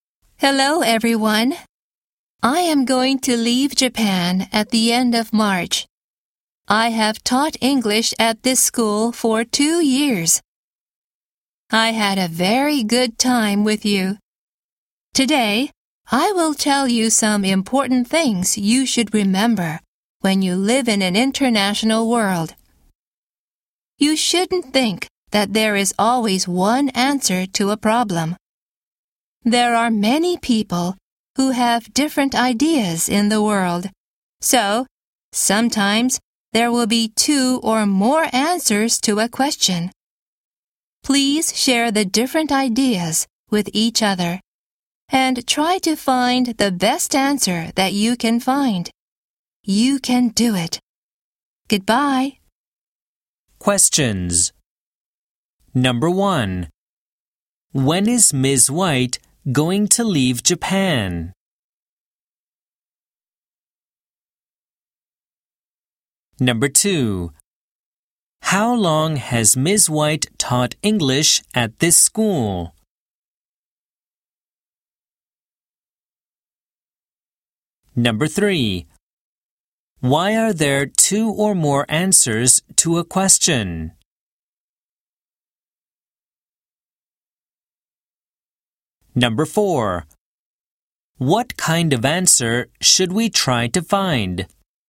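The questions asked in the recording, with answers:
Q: When is Ms. White going to leave Japan?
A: At the end of March

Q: How long has Ms. White taught English at this school?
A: For 2 years

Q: Why are there 2 or more answers to a question?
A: Because there are many people who have different ideas in the world

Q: What kind of answer should we try to find?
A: The best answer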